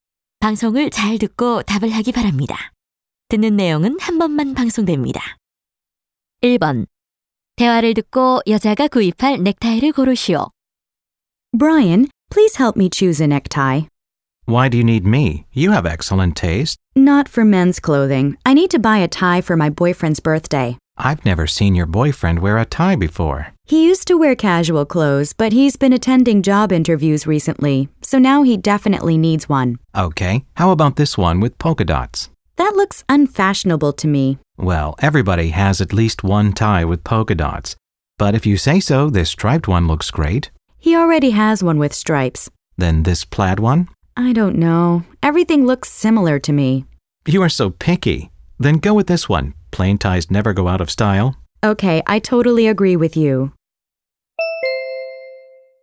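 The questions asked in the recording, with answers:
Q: 대화를 듣고 여자가 구입할 넥타이를 고르시오.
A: 무늬 없는 넥타이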